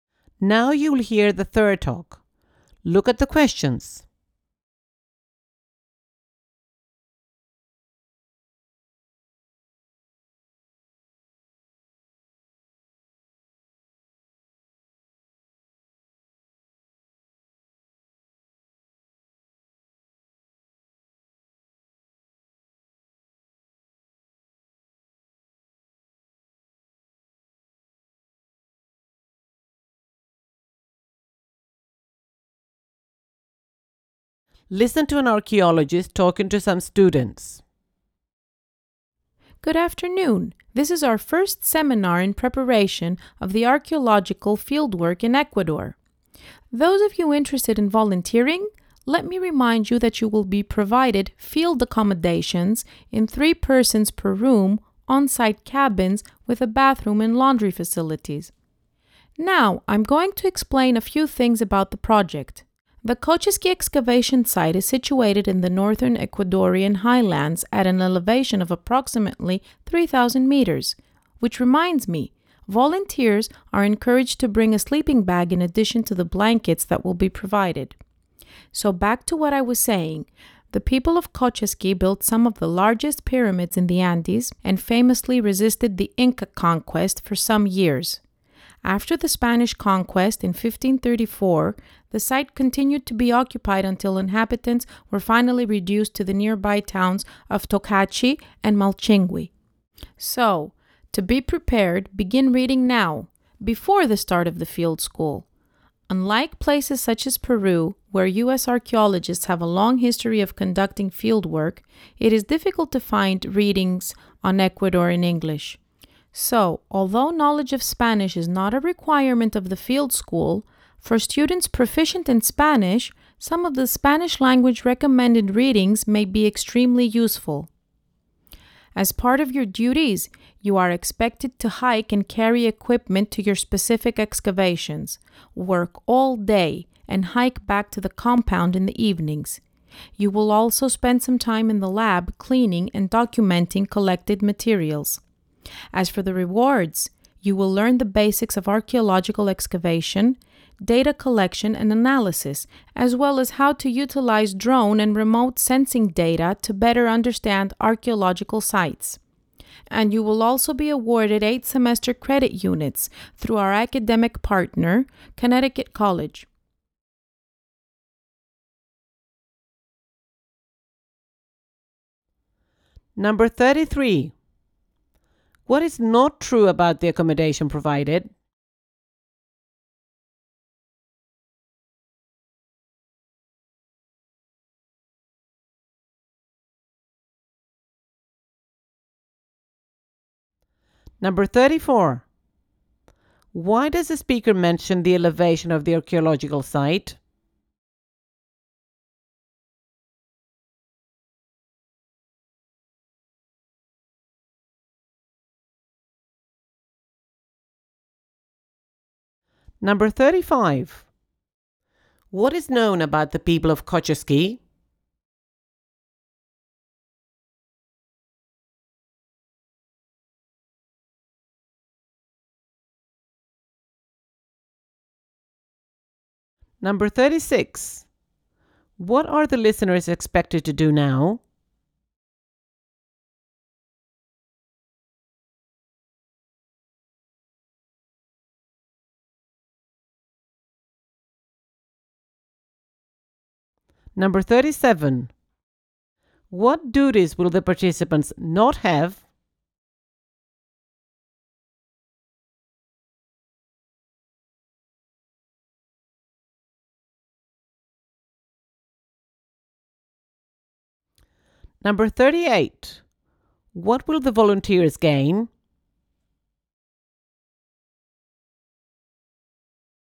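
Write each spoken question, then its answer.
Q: Why does the speaker mention the elevation of the archaeological site?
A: To advise volunteers to bring a sleeping bag

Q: What is known about the people of Kochiski?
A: They built some of the largest pyramids in the Andes and resisted the Inca conquest

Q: What are the listeners expected to do now?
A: Begin reading

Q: What will the volunteers gain?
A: Basic archaeological skills and 8 semester credit units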